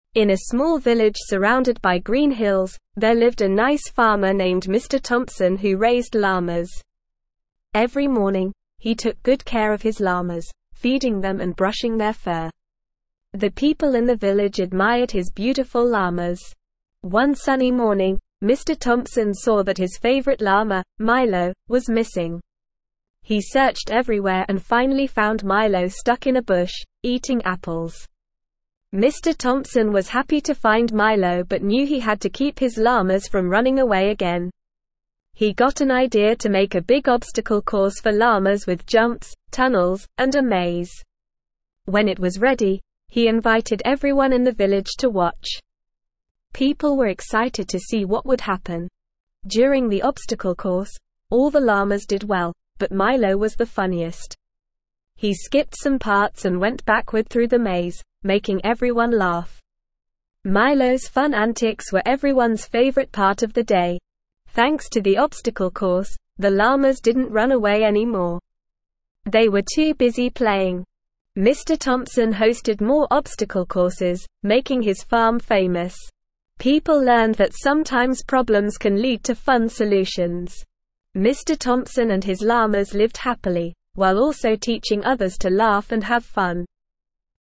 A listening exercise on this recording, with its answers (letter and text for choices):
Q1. What kind of animals did Mr. Thompson raise on his farm?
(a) Cows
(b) Llamas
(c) Horses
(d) Pigs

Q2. What did Mr. Thompson do to prevent his llamas from running away again?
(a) Built a fence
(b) Locked them in a barn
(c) Hired a llama trainer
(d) Created an obstacle course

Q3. How did Milo behave during the obstacle course?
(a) He completed every part perfectly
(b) He skipped some parts and went backward through the maze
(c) He refused to participate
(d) He got scared and ran away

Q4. What was everyone's favorite part of the day?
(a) Watching the other llamas complete the course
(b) Eating apples after the event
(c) Milo's funny antics during the obstacle course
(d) Seeing Mr. Thompson's farm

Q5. What did Mr. Thompson's llamas do after the obstacle course was built?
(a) They played and didn't run away anymore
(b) They continued to escape from the farm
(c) They became sad and didn't want to play anymore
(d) They refused to go near the obstacle course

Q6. What did Mr. Thompson's farm become known for?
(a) Hosting obstacle courses for llamas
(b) Growing delicious apples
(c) Having the friendliest llamas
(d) Being located in a beautiful village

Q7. What did Mr. Thompson teach others through his obstacle courses?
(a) To be serious and focused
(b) To be careful around llamas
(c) To avoid problems at all costs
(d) To laugh and have fun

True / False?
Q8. Mr. Thompson finds Milo stuck in a tree, munching on apples.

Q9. The llamas enjoy playing on the obstacle course and stop running away.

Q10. The obstacle course has jumps, tunnels, and a maze for the llamas to navigate.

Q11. Mr. Thompson is a farmer who takes care of llamas in a small village.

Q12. Milo is Mr. Thompson's least favorite llama who goes missing one morning.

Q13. During the obstacle course, Milo's serious demeanor makes everyone take notice.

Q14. Mr. Thompson decides to build an obstacle course for the llamas to prevent them from running away.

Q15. Mr. Thompson's farm becomes infamous because of the obstacle courses he hosts.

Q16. there lived a nice farmer (1)______ Mr. Thompson who raised llamas.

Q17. Every morning, he took (2)______ care of his llamas, feeding them and brushing their fur.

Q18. The people in the village admired his (3)______ llamas.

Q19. One sunny morning, Mr. Thompson saw that his favorite llama, Milo, was (4)______.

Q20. He searched everywhere and finally found Milo stuck in a (5)______, eating apples.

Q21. He got an idea to make a big (6)______ course for llamas with jumps, tunnels, and a maze.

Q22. During the obstacle course, all the llamas did well, but (7)______ was the funniest.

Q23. He skipped some parts and went backward through the (8)______, making everyone (9)______.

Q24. He skipped some parts and went backward through the (8)______, making everyone (9)______.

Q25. Mr. (10)______ hosted more obstacle courses, (11)______ his farm famous.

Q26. Mr. (10)______ hosted more obstacle courses, (11)______ his farm famous.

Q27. People (12)______ that sometimes problems can lead to fun solutions.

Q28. What did Mr. Thompson do every morning for his llamas?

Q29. What did Mr. Thompson do to keep his llamas from running away again?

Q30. What did Mr. Thompson invite everyone in the village to do?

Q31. What did Milo do during the obstacle course that made everyone laugh?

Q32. What did Mr. Thompson's obstacle courses teach people?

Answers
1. (b) Llamas
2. (d) Created an obstacle course
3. (b) He skipped some parts and went backward through the maze
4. (c) Milo's funny antics during the obstacle course
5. (a) They played and didn't run away anymore
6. (a) Hosting obstacle courses for llamas
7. (d) To laugh and have fun
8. False
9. True
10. True
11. True
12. False
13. False
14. True
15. False
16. named
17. good
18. beautiful
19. missing
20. bush
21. obstacle
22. Milo
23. maze
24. laugh
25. Thompson
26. making
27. learned
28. Mr. Thompson took good care of his llamas, feeding them and brushing their fur.
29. Mr. Thompson made a big obstacle course for the llamas with jumps, tunnels, and a maze.
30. Mr. Thompson invited everyone in the village to watch the llamas go through the obstacle course.
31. Milo skipped some parts and went backward through the maze, making everyone laugh.
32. Mr. Thompson's obstacle courses taught people that sometimes problems can lead to fun solutions.

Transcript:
In a small village surrounded by green hills, there lived a nice farmer named Mr. Thompson who raised llamas. Every morning, he took good care of his llamas, feeding them and brushing their fur. The people in the village admired his beautiful llamas.
One sunny morning, Mr. Thompson saw that his favorite llama, Milo, was missing. He searched everywhere and finally found Milo stuck in a bush, eating apples. Mr. Thompson was happy to find Milo but knew he had to keep his llamas from running away again.
He got an idea to make a big obstacle course for llamas with jumps, tunnels, and a maze. When it was ready, he invited everyone in the village to watch. People were excited to see what would happen.
During the obstacle course, all the llamas did well, but Milo was the funniest. He skipped some parts and went backward through the maze, making everyone laugh. Milo's fun antics were everyone's favorite part of the day.
Thanks to the obstacle course, the llamas didn't run away anymore. They were too busy playing. Mr. Thompson hosted more obstacle courses, making his farm famous. People learned that sometimes problems can lead to fun solutions. Mr. Thompson and his llamas lived happily, while also teaching others to laugh and have fun.

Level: Level 2